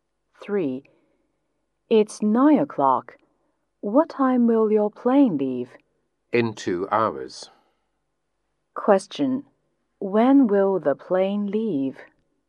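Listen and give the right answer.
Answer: At 11 o'clock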